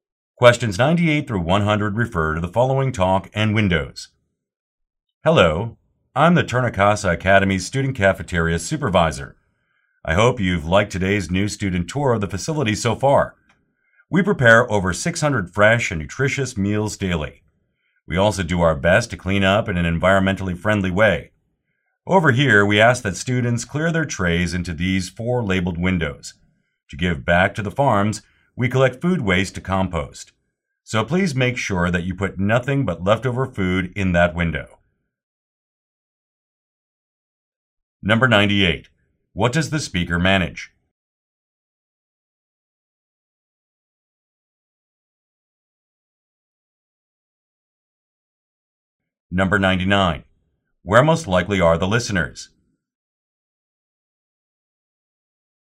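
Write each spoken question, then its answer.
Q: What does the speaker manage?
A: A student cafeteria

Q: Where most likely are the listeners?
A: On a tour of the cafeteria for new students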